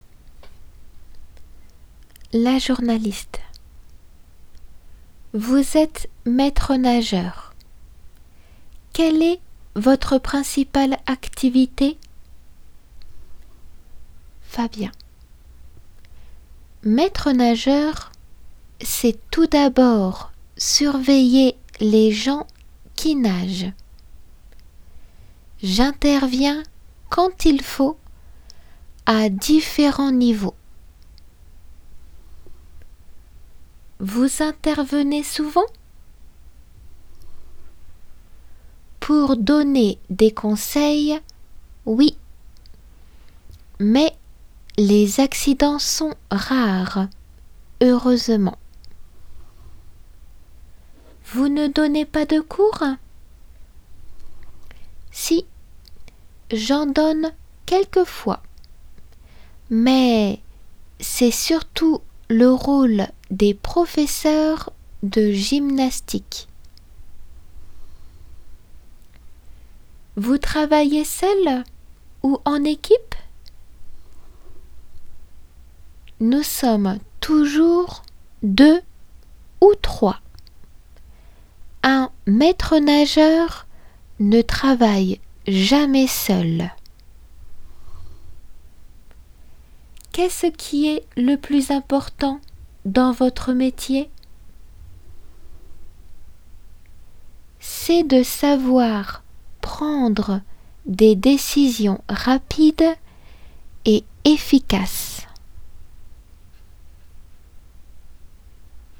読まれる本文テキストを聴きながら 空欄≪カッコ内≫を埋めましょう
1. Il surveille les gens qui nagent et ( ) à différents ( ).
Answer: intervient niveaux

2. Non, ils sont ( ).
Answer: rares

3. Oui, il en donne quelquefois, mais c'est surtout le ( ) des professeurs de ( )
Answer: rôle gymnastique

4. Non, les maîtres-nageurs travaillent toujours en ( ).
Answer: équipe

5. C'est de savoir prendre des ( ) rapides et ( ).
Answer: décisions efficaces

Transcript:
La journaliste : Vous êtes maître-nageur. Quelle est votre principale activité ?
Fabien : Maître-nageur, c'est tout d'abord surveiller les gens qui nagent. J'interviens quand il faut, à différents niveaux.
La j : Vous intervenez souvent ?
F : Pour donner des conseils, oui. Mais les accidents sont rares, heureusement.
La j : Vous ne donnez pas de cours ?
F : Si. J'en donne quelquefois. Mais c'est surtout le rôle des professeurs de gymnastique.
La j : Vous travaillez seul ou en équipe ?
F : Nous sommes toujours deux ou trois. Un maître-nageur ne travaille jamais seul.
La j : Qu'est-ce qui est le plus important dans votre métier ?
F : C'est de savoir prendre des décisions rapides et efficaces.